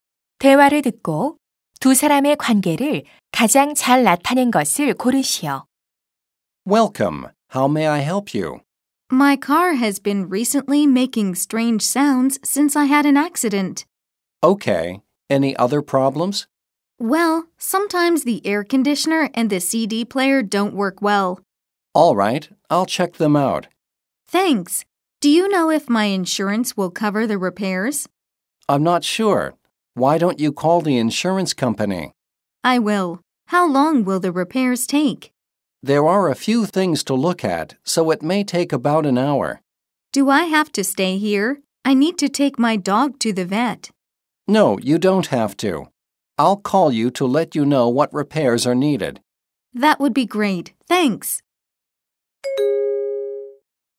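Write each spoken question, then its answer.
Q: 대화를 듣고 두 사람의 관계를 가장 잘 나타낸 것을 고르시오.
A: 자동차 정비사 — 고객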